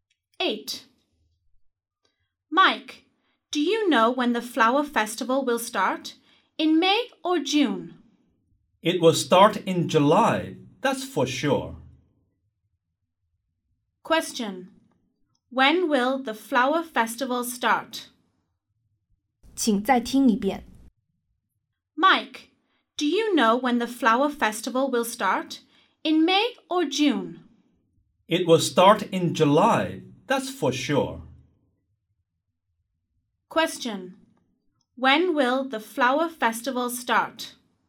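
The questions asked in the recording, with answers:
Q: When will the flower festival start?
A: In July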